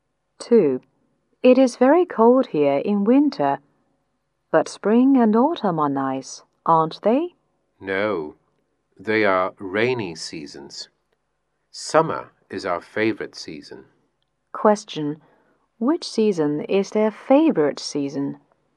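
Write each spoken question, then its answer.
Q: which season is their favorite season?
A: Summer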